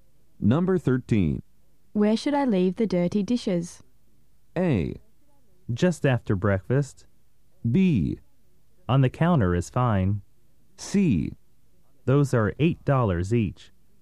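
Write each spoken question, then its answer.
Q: Where should I leave the dirty dishes?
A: B: On the counter is fine.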